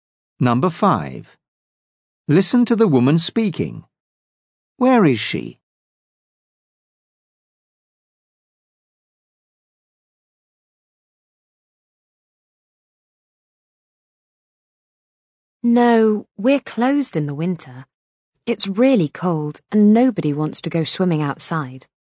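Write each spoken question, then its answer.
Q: Where is she?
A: at an outdoor swimming pool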